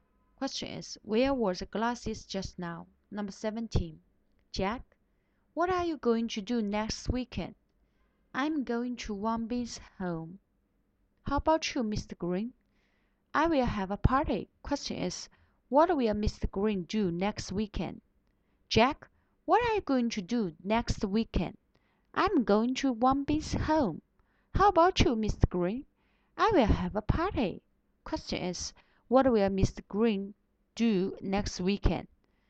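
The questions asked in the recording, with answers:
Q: Question is, what will Mr. Green do next weekend?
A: Have a party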